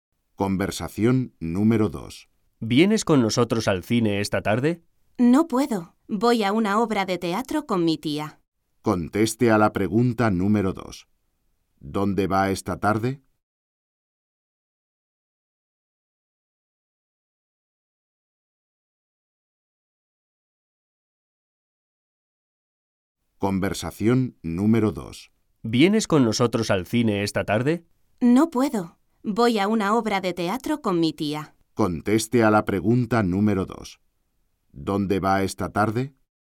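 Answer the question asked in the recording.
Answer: Al teatro, con su tía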